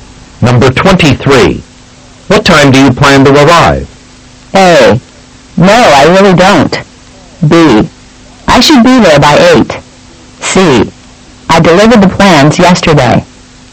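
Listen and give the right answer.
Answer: B: I should be there by 8.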